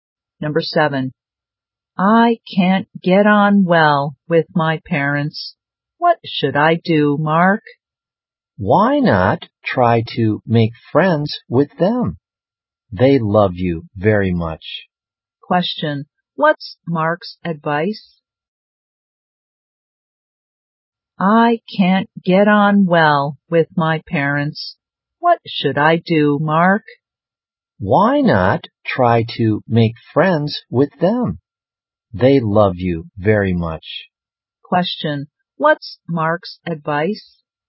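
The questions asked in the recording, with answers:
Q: Question, what's Mark's advice?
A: Try to make friends with the parents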